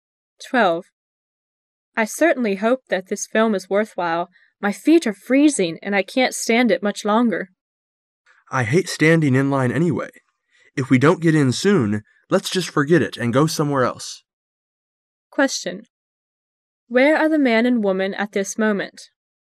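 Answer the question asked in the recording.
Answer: Standing in line outside a movie theater

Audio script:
[解析] W: I certainly hope that this film is worthwhile. My feel are freezing, and I can't stand it much longer. M: I hate standing in line anyway. If we don't get in soon, let's just forget it and go somewhere else. Q: Where are the man and woman at this moment?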